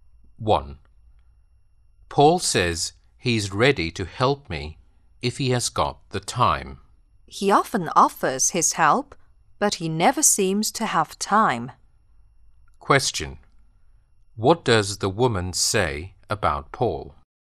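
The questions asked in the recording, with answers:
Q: What does the woman say about Paul?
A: He often offers help but never seems to have time.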